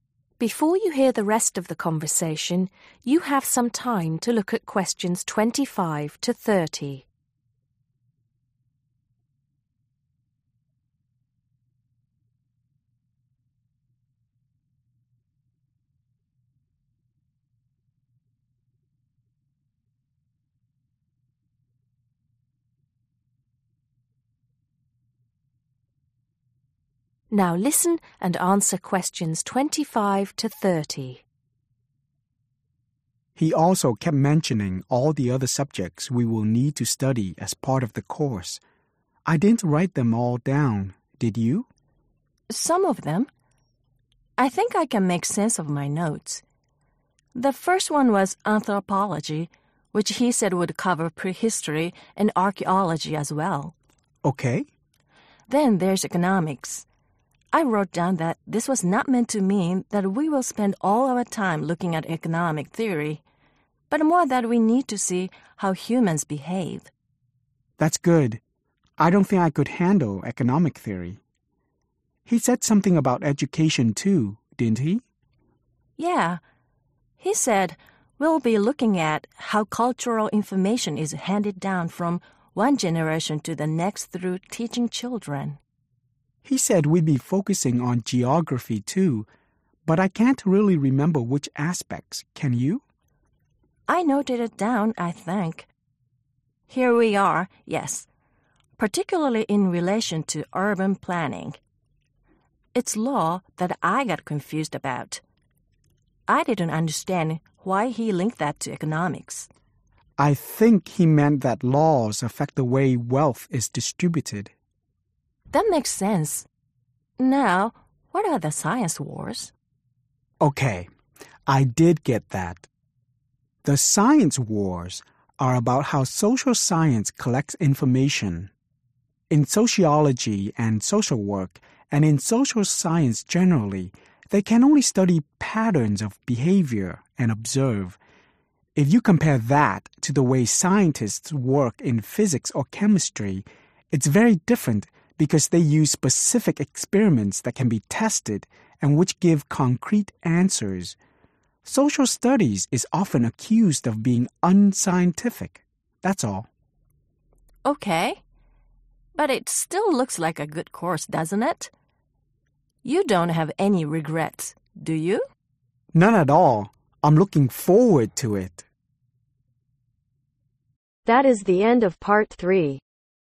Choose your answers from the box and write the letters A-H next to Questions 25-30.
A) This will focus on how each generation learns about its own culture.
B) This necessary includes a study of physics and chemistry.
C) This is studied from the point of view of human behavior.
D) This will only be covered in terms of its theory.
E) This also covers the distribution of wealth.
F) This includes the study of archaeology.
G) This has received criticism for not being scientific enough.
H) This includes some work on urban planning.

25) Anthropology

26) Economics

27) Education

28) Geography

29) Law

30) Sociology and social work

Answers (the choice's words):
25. This includes the study of archaeology.
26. This is studied from the point of view of human behavior.
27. This will focus on how each generation learns about its own culture.
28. This includes some work on urban planning.
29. This also covers the distribution of wealth.
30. This has received criticism for not being scientific enough.